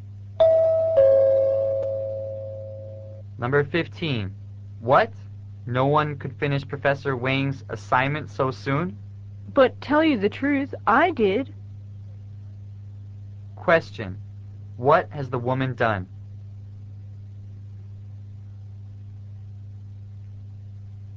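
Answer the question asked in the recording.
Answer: She has finished Professor Wang's assignment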